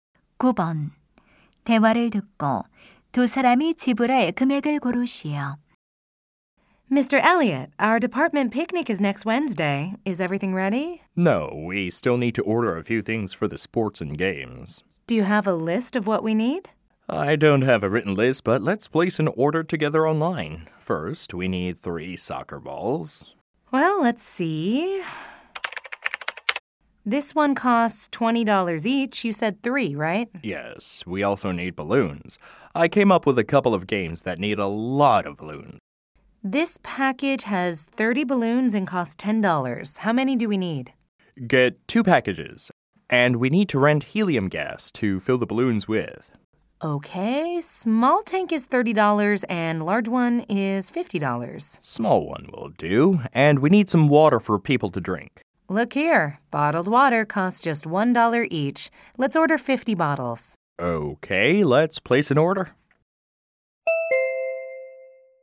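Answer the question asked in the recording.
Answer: $160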